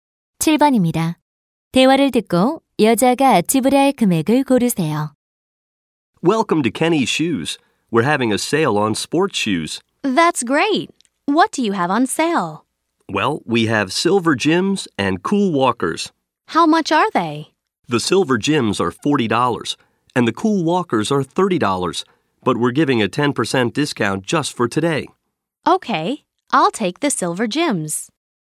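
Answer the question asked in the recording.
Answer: 36달러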